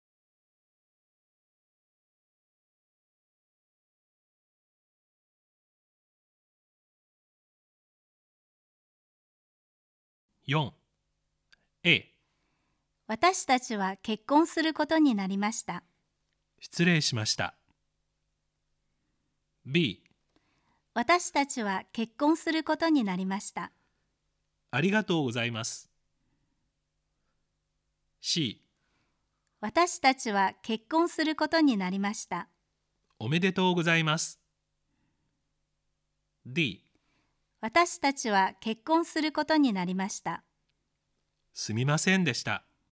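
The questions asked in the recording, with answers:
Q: 私たちは結婚することになりました。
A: C: おめでとうございます。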